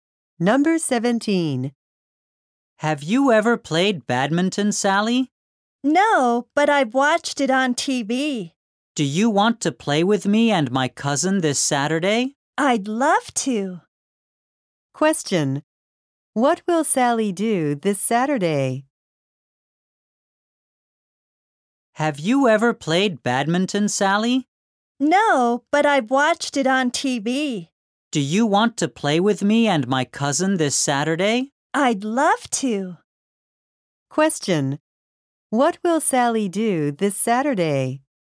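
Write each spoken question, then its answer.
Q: What will Sally do this Saturday?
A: Play badminton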